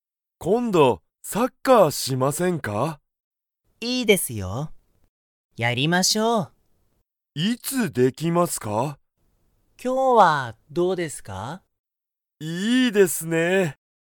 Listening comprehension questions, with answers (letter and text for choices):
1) 田中(たなか)さんと木村(きむら)さんは、____サッカーをやる。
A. 結構(けっこう)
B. 最近(さいきん)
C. すぐそこで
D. 今日(きょう)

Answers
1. D. 今日(きょう)

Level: Level 1